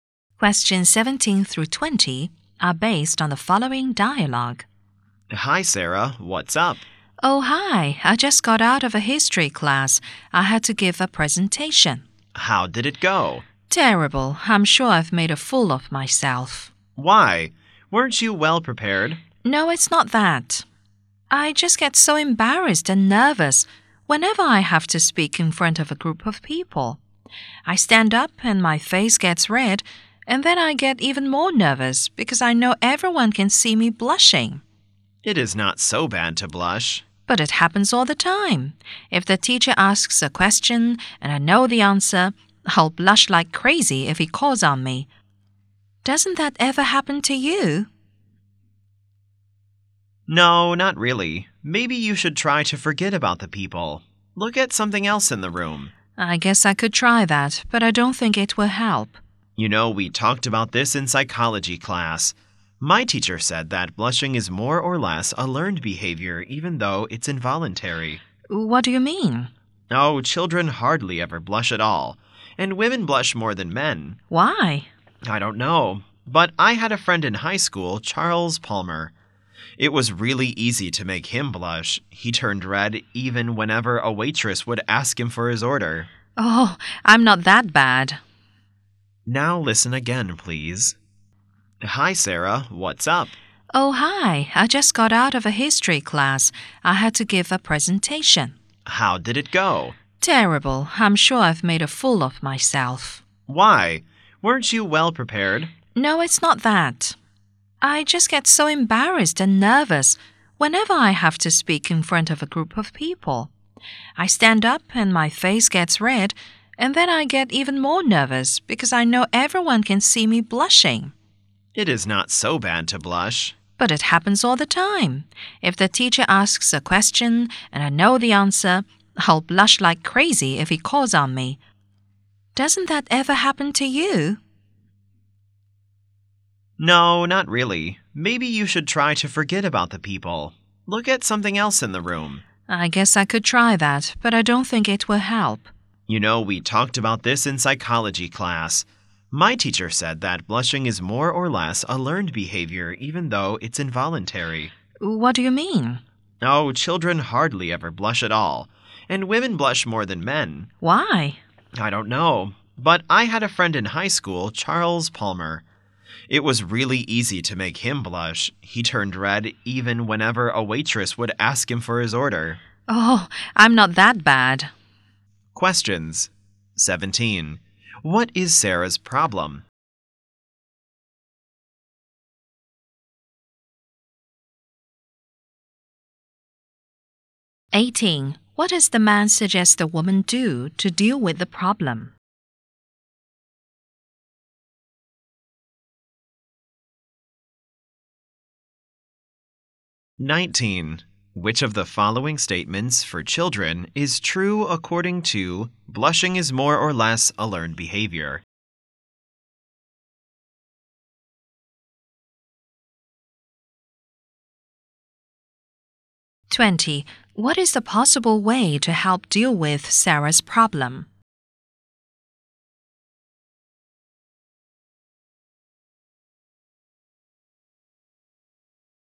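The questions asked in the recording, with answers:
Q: What is Sarah's problem?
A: She blushes and gets nervous when speaking in front of people

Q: What does the man suggest the woman do to deal with the problem?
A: Forget about the people and look at something else in the room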